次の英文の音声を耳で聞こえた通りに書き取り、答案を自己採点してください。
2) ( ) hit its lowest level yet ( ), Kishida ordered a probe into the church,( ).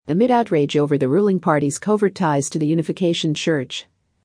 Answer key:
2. amid outrage over the ruling party's covert ties to the Unification Church

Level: 上級レベル